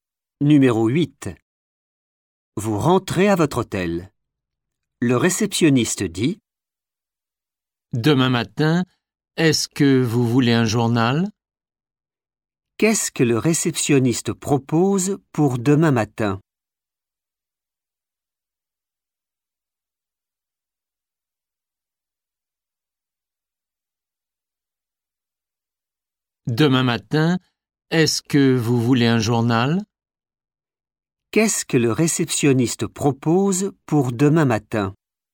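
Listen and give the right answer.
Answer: un journal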